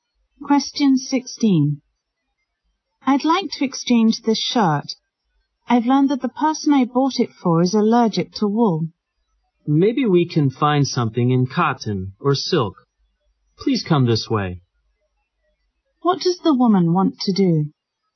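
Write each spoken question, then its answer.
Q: What does the woman want to do?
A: Exchange the wool shirt for one in cotton or silk.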